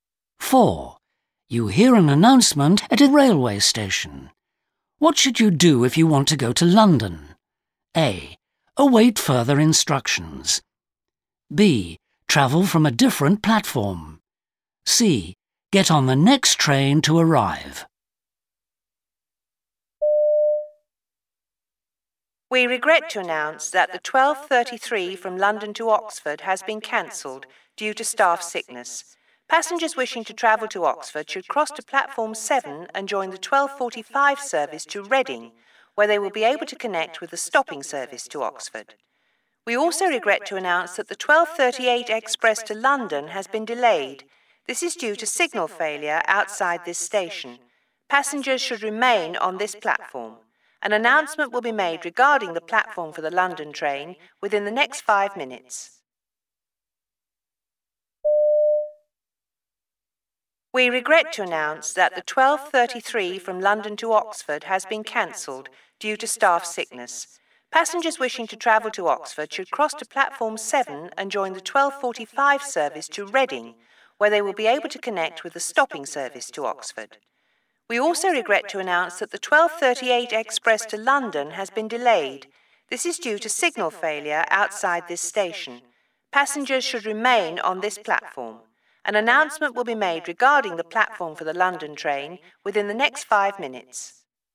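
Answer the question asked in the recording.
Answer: A: Await further instructions.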